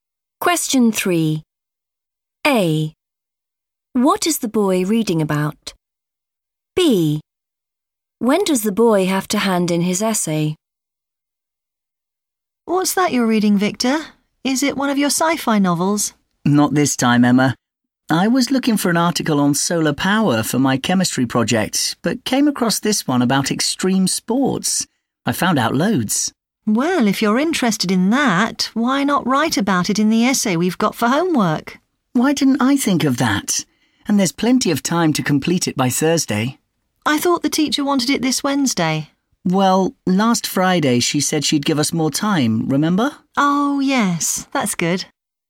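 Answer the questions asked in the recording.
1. extreme sports
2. by Thursday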